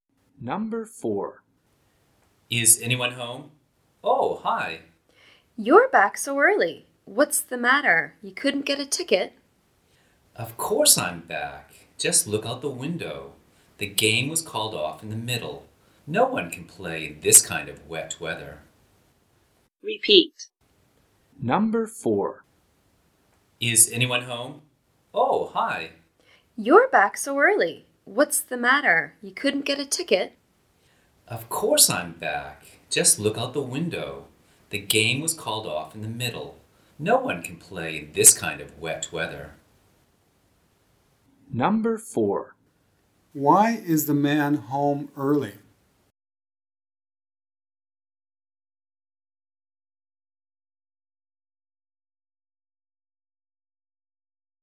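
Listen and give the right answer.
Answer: The game was called off because of rain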